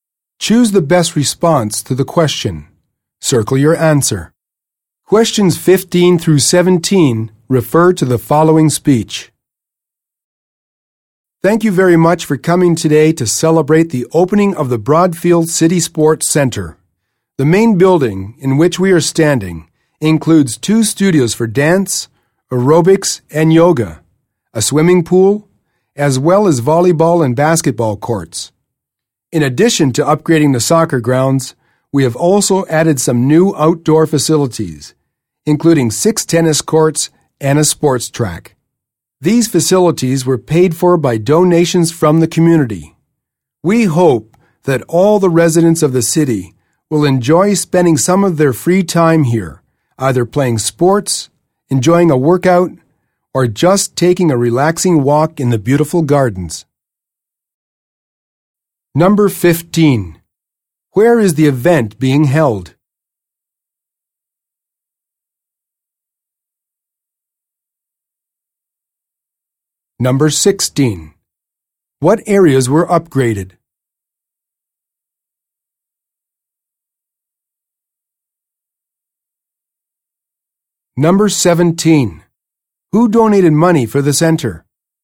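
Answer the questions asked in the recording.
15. At the new Broadfield City Sports Center
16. The soccer grounds
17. The community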